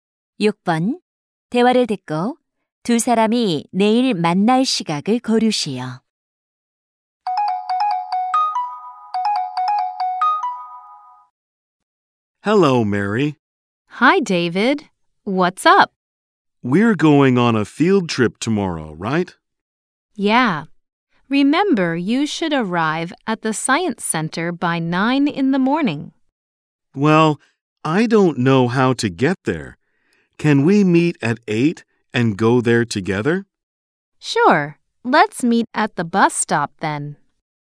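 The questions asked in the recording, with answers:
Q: 대화를 듣고 두 사람이 내일 만날 시각을 고르시오.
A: 8시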